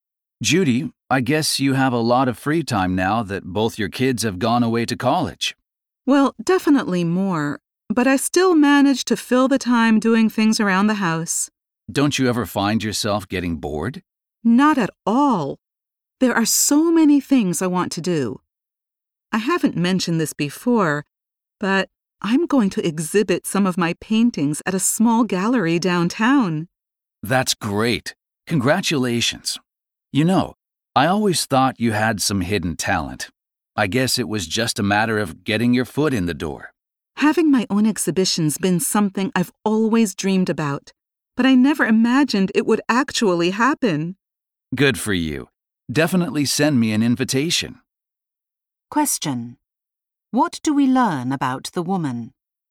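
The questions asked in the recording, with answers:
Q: What do we learn about the woman?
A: She will show some of her paintings at a small gallery downtown.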